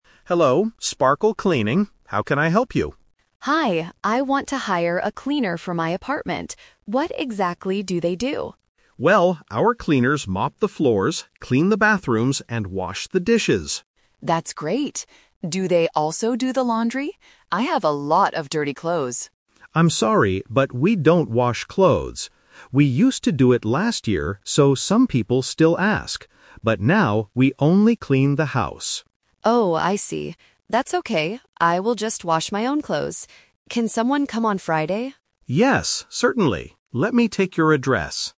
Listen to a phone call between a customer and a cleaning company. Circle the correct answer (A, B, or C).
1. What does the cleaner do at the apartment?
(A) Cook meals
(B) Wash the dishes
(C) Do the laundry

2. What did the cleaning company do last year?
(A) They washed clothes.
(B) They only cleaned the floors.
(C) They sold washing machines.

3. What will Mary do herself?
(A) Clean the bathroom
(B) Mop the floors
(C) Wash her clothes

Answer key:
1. Wash the dishes
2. They washed clothes.
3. Wash her clothes

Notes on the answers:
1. David clearly lists the tasks: "...our cleaners mop the floors, clean the bathrooms, and wash the dishes." Option (C) is the trap because Mary asks about it, but David says they don't do it. Option (A) is a plausible household task, but it is not mentioned in the audio.
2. When Mary asks about the laundry (dirty clothes), David says, "We used to do it last year..." Option (B) is incorrect because they also cleaned bathrooms and washed dishes. Option (C) is a plausible guess related to clothes, but it is not mentioned.
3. After David says they don't do laundry, Mary replies, "That's okay. I will just wash my own clothes." Options (A) and (B) are traps: cleaning the bathroom and mopping the floors are the tasks that the company's cleaner will do for her.

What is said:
David: Hello, Sparkle Cleaning. How can I help you?
Mary: Hi, I want to hire a cleaner for my apartment. What exactly do they do?
David: Well, our cleaners mop the floors, clean the bathrooms, and wash the dishes.
Mary: That's great. Do they also do the laundry? I have a lot of dirty clothes.
David: I'm sorry, but we don't wash clothes. We used to do it last year, so some people still ask. But now we only clean the house.
Mary: Oh, I see. That's okay. I will just wash my own clothes.

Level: A2

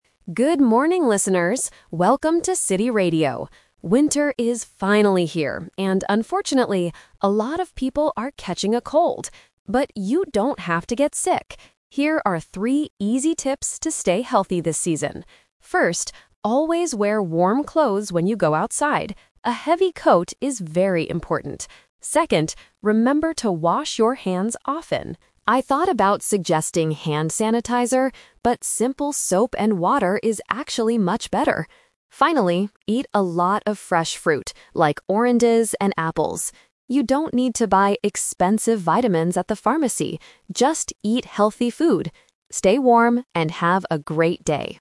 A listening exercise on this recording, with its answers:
Listen to the radio host talking about winter health. Choose the correct answer (A, B, or C) for each question.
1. What is the first tip the host gives to the listeners?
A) Eat a lot of healthy food.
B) Wear warm clothes outside.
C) Stay inside the house all day.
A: Wear warm clothes outside.

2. What is the best way to clean your hands, according to the host?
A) Using hand sanitizer.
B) Using simple soap and water.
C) Wearing warm gloves.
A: Using simple soap and water.

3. What does the host say about vitamins?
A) You don't need to buy them at the pharmacy.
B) You should buy them to stay healthy.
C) You can get them from the hospital.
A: You don't need to buy them at the pharmacy.

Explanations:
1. The host clearly says, "First, always wear warm clothes when you go outside." Trap A is wrong: Eating healthy food is the third tip, not the first tip. Trap C is wrong: Staying inside all day is a plausible idea for winter, but it is not mentioned in the audio.
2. The host explicitly states that "simple soap and water is actually much better." Trap A is wrong (The Twist): The host says, "I thought about suggesting hand sanitizer, but...". Hand sanitizer is mentioned, but it is rejected because soap and water is better. Trap C is wrong: Gloves are related to winter and keeping hands warm, but not for cleaning them.
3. The host advises the listeners to eat fruit and says, "You don't need to buy expensive vitamins at the pharmacy." Trap B is wrong: This is the exact opposite of what the host says. The host wants you to eat fresh fruit instead of buying vitamins. Trap C is wrong: A hospital is a medical place, but it is never mentioned in the broadcast.

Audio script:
Radio Host: Good morning, listeners! Welcome to City Radio. Winter is finally here, and unfortunately, a lot of people are catching a cold. But you don't have to get sick! Here are three easy tips to stay healthy this season.
First, always wear warm clothes when you go outside. A heavy coat is very important. Second, remember to wash your hands often. I thought about suggesting hand sanitizer, but simple soap and water is actually much better. Finally, eat a lot of fresh fruit like oranges and apples. You don't need to buy expensive vitamins at the pharmacy. Just eat healthy food! Stay warm, and have a great day!

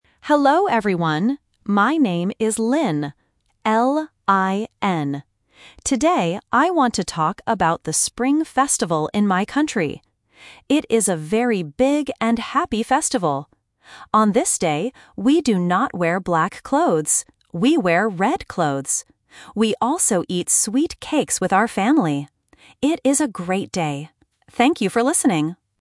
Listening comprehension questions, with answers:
Listen to the conversation and choose the correct answer (A, B, or C).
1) What festival does Lin talk about?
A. The Summer Festival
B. The Spring Festival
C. The Winter Festival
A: The Spring Festival

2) What color clothes do they wear for the festival?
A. Black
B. White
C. Red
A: Red

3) What do they eat on this day?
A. Sweet cakes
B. Hot soup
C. Fresh fruit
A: Sweet cakes

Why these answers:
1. Lin clearly says, "I want to talk about the Spring Festival in my country." Trap: Options (A) and (C) are other seasons, but they are not mentioned in the presentation.
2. Lin says, "We wear red clothes." Trap: Option (A) is a classic trap. Lin says the word "black", but she says "we do not wear black clothes". Option (B) is not mentioned.
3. Lin says, "We also eat sweet cakes with our family." Trap: Options (B) and (C) are plausible foods for a festival, but they are never mentioned in the audio.

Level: A1

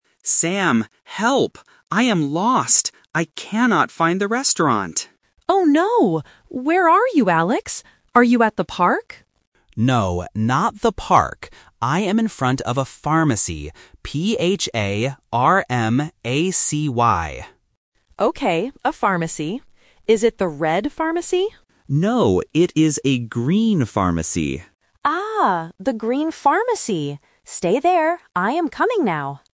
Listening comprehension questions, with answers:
Listen to the phone conversation between two friends. Read the questions and choose the correct answer (A, B, or C).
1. What is Alex's problem?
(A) He cannot find the park.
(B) He cannot find the restaurant.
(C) He cannot find his hotel.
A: He cannot find the restaurant.

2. Where is Alex now?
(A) At the park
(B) At the pharmacy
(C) At the hospital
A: At the pharmacy

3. What color is the pharmacy?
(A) Red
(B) Green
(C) Blue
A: Green

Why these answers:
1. Alex explicitly states his problem at the beginning: "I am lost. I cannot find the restaurant." Why the traps are wrong: Option A is a trap because the word "park" is mentioned later, but he is not looking for it. Option C is a plausible problem for a tourist, but it is never mentioned in the audio.
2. Alex states his location clearly and spells it out: "I am in front of a pharmacy. P-H-A-R-M-A-C-Y." Why the traps are wrong: Option A is a trap because Sam asks, "Are you at the park?", but Alex rejects it by saying, "No, not the park." Option C is a plausible building but is not mentioned.
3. Alex corrects his friend and says, "No, it is a green pharmacy." Why the traps are wrong: Option A is a trap because Sam guesses, "Is it the red pharmacy?", but Alex says no. Option C is a plausible color but is never mentioned.

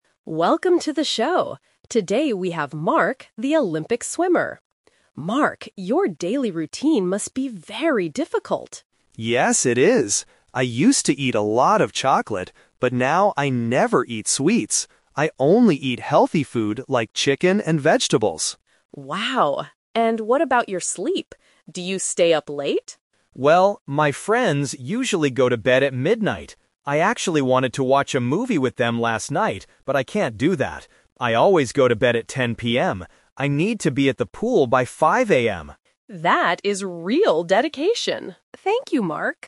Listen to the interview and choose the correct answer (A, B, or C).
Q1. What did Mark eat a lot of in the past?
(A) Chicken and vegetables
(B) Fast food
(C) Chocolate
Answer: Chocolate

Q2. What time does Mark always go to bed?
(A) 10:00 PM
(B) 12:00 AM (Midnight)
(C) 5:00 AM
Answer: 10:00 PM

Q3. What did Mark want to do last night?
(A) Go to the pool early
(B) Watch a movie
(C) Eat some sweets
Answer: Watch a movie

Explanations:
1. Mark says, "I used to eat a lot of chocolate." Option A (Chicken and vegetables) is a trap because that is what he eats now. Option B is not mentioned.
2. Mark clearly states, "I always go to bed at 10:00 PM." Option B (Midnight) is a trap because that is when his friends go to bed. Option C (5:00 AM) is a trap because that is when he goes to the pool.
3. Mark says, "I actually wanted to watch a movie with them last night, but I can't do that." Option A is a trap because going to the pool is his morning routine, not what he wanted to do last night. Option C is a trap because he mentions sweets earlier, but not as something he wanted to do last night.

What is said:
Announcer: Welcome to the show! Today we have Mark, the Olympic swimmer. Mark, your daily routine must be very difficult.
Mark: Yes, it is. I used to eat a lot of chocolate, but now I never eat sweets. I only eat healthy food like chicken and vegetables.
Announcer: Wow. And what about your sleep? Do you stay up late?
Mark: Well, my friends usually go to bed at midnight. I actually wanted to watch a movie with them last night, but I can't do that. I need to be at the pool by 5:00 AM!

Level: A2

